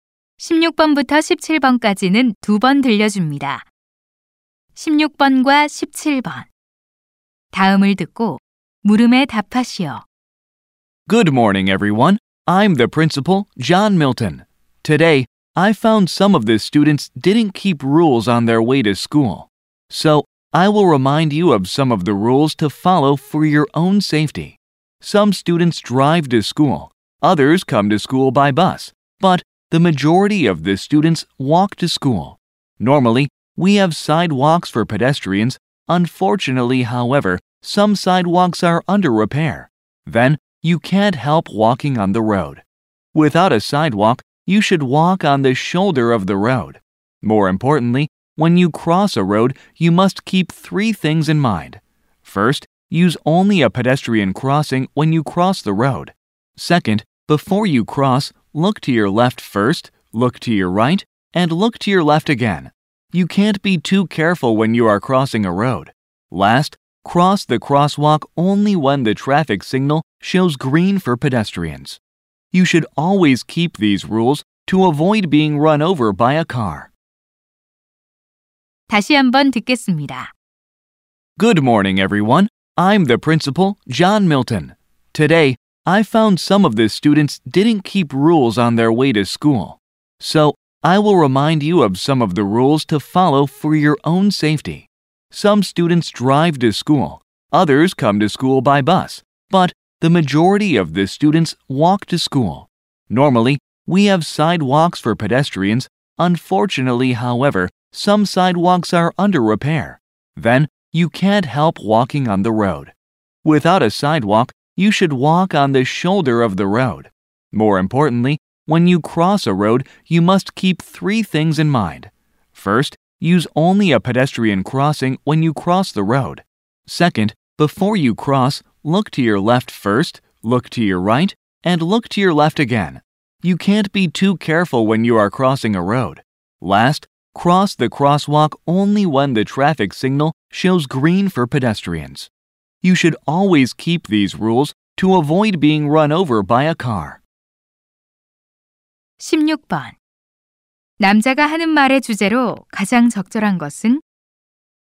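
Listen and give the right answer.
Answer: 등굣길 보행 안전 수칙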